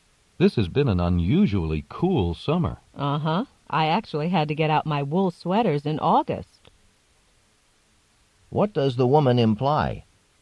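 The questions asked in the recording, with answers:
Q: What does the woman imply?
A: She agrees that it has been unusually cold this summer.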